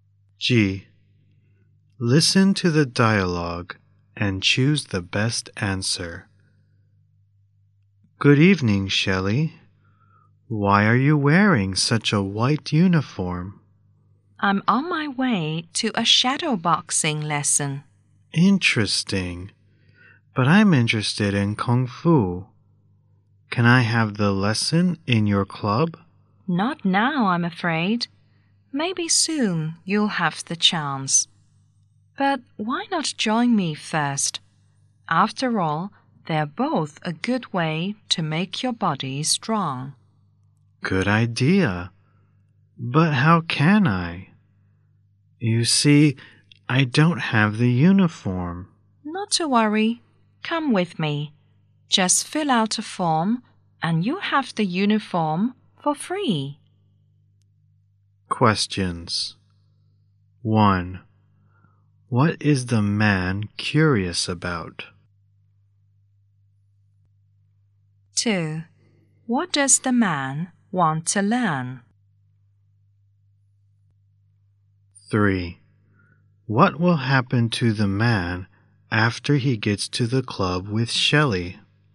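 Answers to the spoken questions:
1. Why Shelley is wearing a white uniform.
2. Kung fu.
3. He will fill out a form and get a free uniform.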